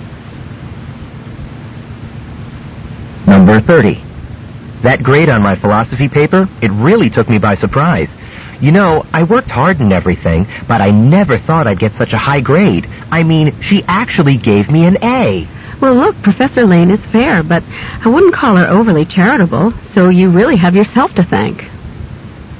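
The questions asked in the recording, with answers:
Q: What does the woman mean?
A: The man earned the high grade through his own work.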